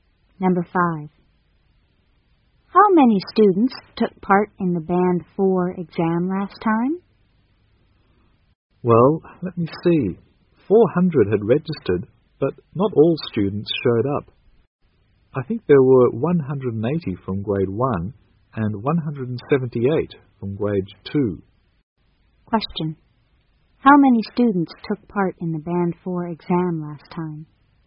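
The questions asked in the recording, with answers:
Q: how many students took part in the Band 4 exam last time?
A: 358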